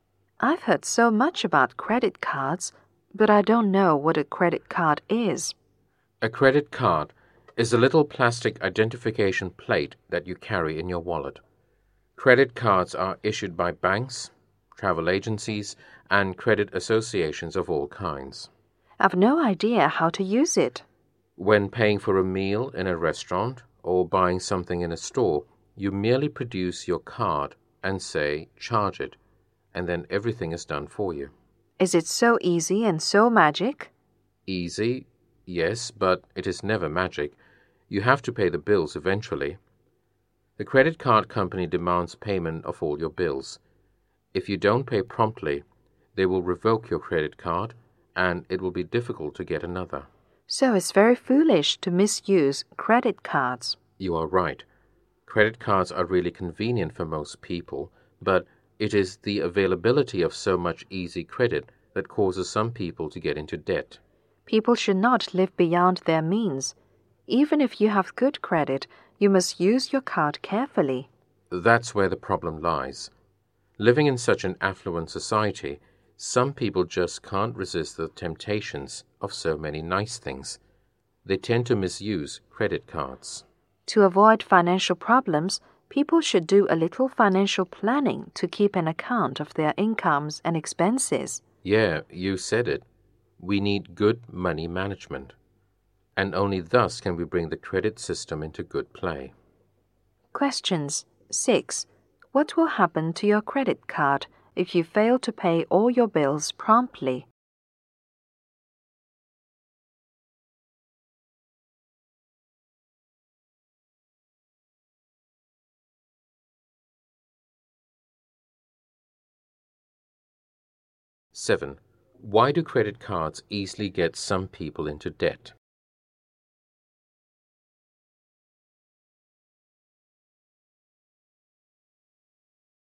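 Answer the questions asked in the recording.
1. It will be revoked
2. So much easy credit is available, so they live beyond their means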